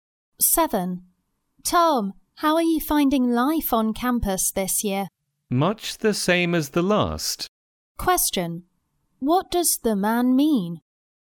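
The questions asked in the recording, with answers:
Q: What does the man mean?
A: His life on campus is much the same as last year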